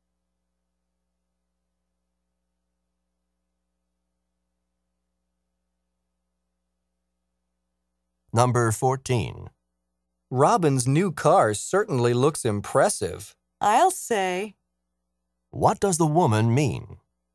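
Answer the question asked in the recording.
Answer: She agrees the car looks impressive.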